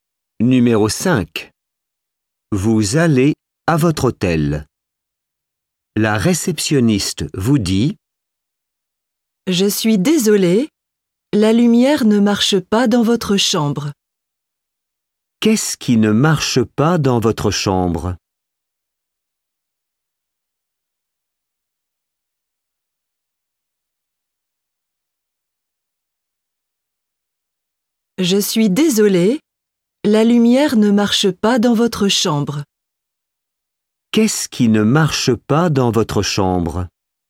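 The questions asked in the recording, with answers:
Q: Qu'est-ce qui ne marche pas dans votre chambre?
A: La lumière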